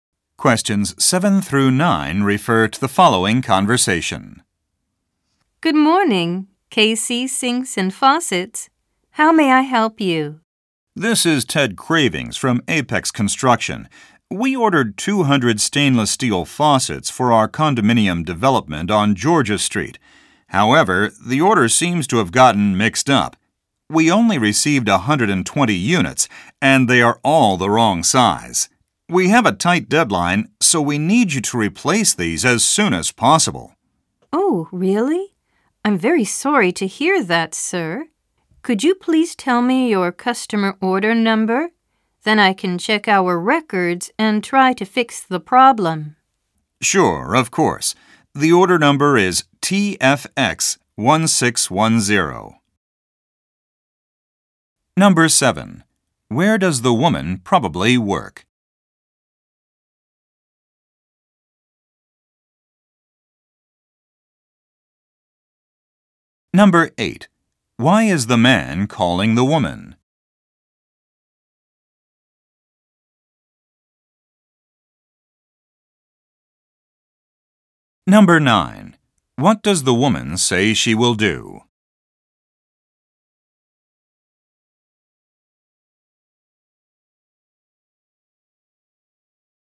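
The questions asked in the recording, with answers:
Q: Where does the woman probably work?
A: At KC Sinks and Faucets

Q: Why is the man calling the woman?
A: His order was mixed up: too few units and the wrong size

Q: What does the woman say she will do?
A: Check their records and try to fix the problem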